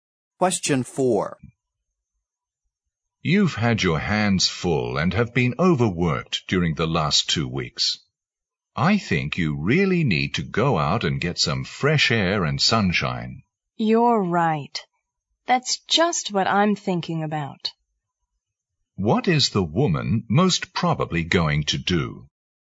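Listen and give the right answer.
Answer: Go out and get some fresh air and sunshine.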